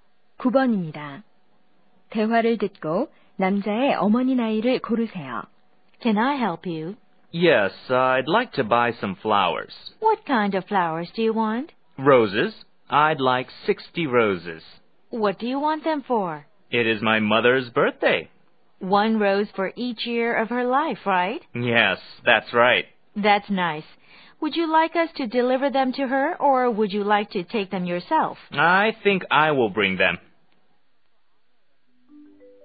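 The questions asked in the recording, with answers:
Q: 대화를 듣고 남자의 어머니 나이를 고르세요.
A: 60세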